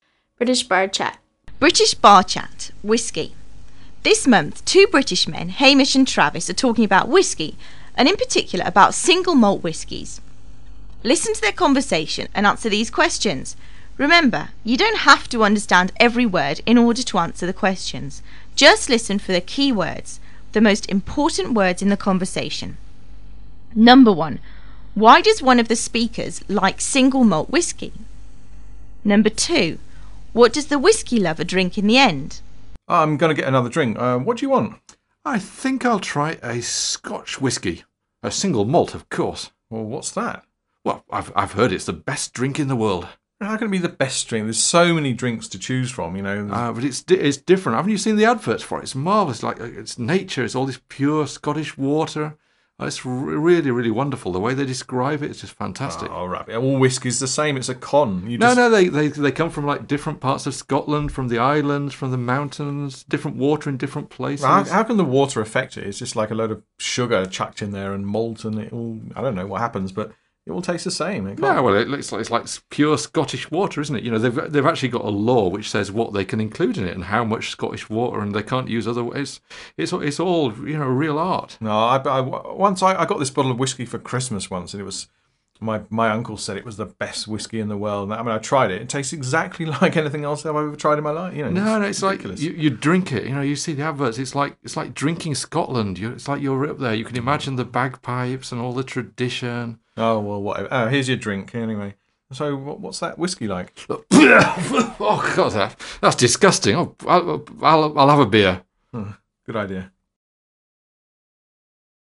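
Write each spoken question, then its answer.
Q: Why does one of the speakers like single malt whiskey?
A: Because of the adverts: he has heard it's the best drink in the world, made with pure Scottish water

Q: What does the whiskey lover drink in the end?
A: A beer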